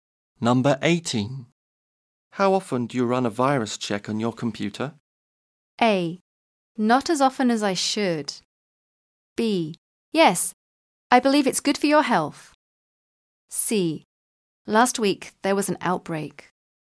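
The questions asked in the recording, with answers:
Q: How often do you run a virus check on your computer?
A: A: Not as often as I should.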